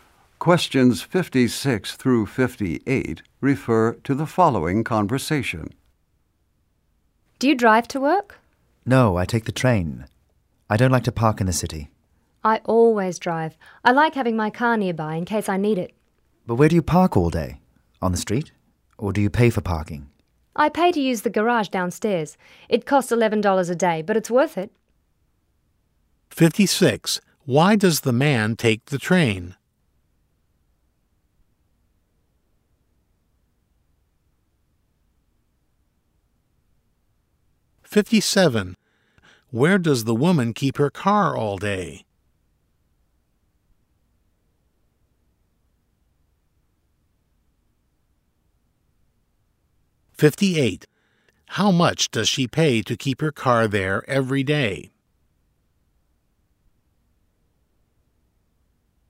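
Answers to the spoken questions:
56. He doesn't like to park in the city
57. In the garage downstairs
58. $11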